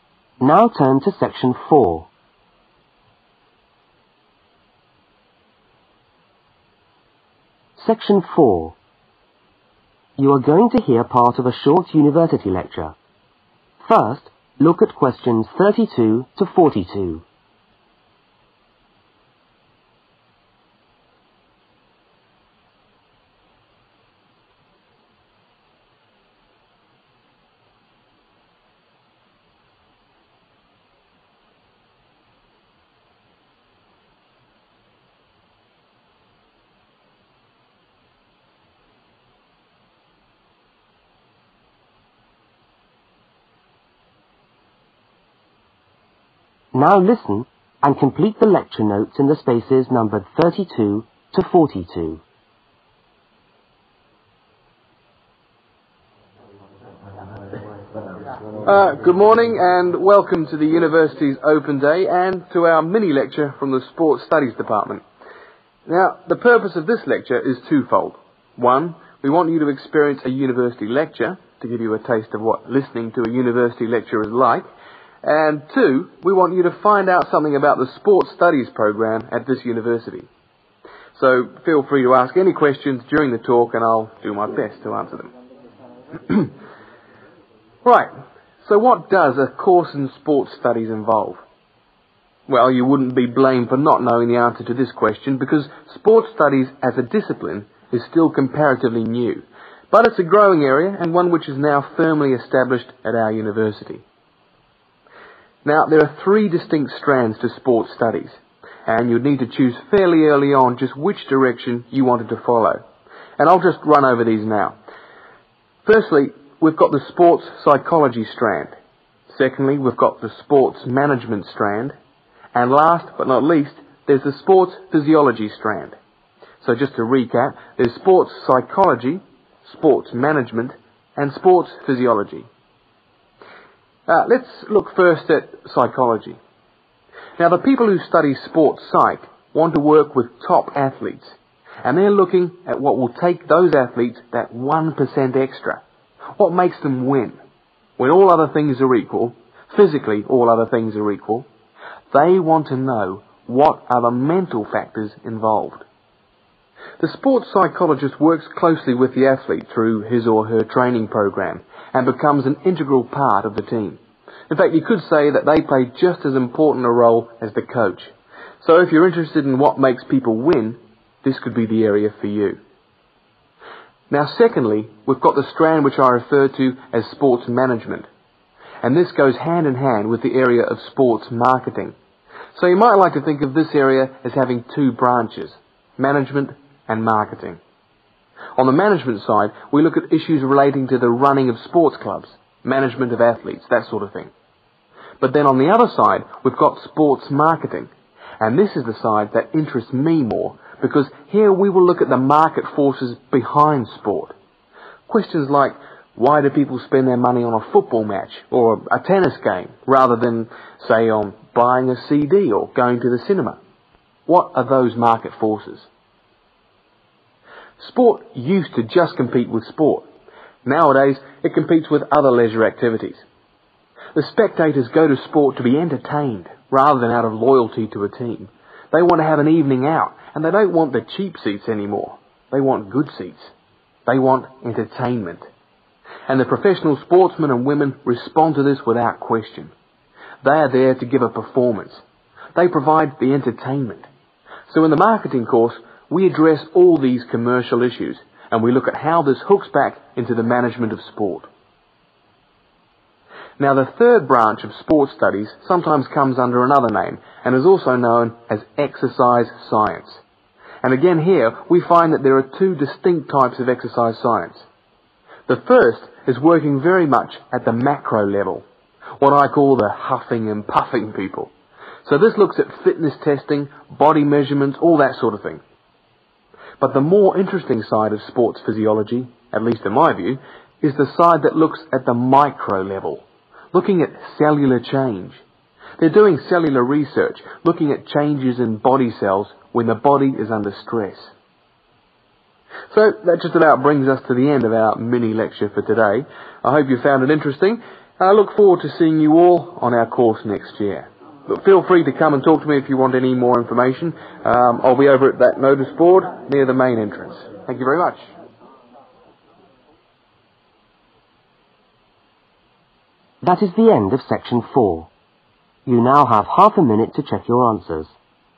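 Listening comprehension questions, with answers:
Complete the lecture notes. Use NO MORE THAN THREE WORDS for each answer.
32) To experience (32)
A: a university lecture

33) To find out about (33)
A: sports studies program

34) Sports (34)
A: management

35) The psychologists work with (35)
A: top athletes

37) Sports marketing looks at (37)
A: market forces

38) Sport now competes with (38)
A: other leisure activities

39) Spectators want (39)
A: entertainment

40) Sports physiology is also known as (40)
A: exercise science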